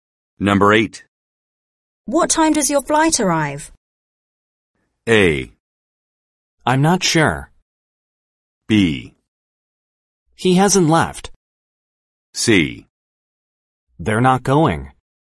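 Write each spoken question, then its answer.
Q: What time does your flight arrive?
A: A: I'm not sure.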